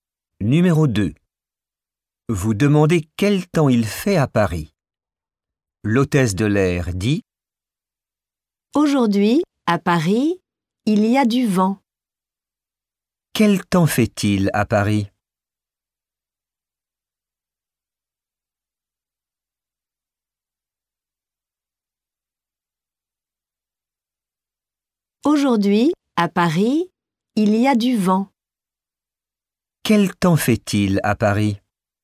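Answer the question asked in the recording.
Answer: Il y a du vent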